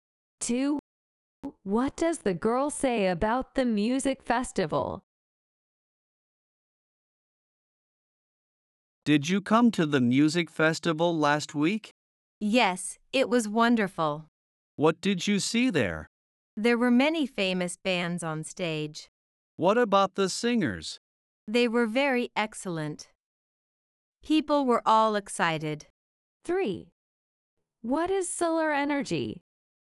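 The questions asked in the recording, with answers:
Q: What does the girl say about the music festival?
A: It was wonderful, with many famous bands and excellent singers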